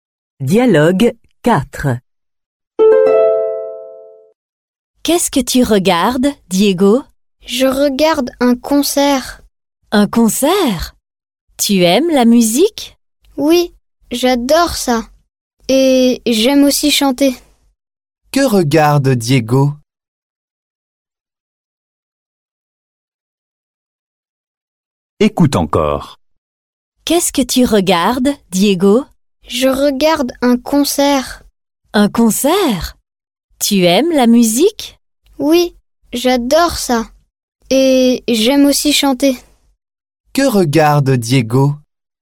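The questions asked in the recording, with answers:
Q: Que regarde Diego?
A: un concert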